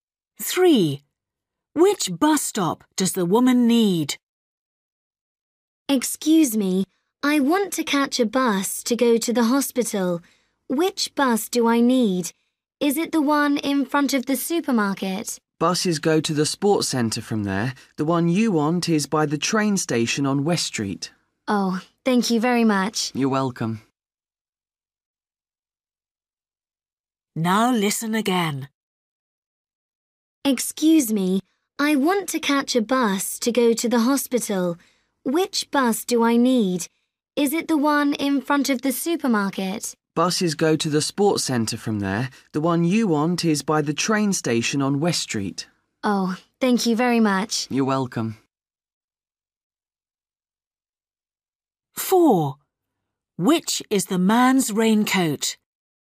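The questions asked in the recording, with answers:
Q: Which bus stop does the woman need?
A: The one by the train station on West Street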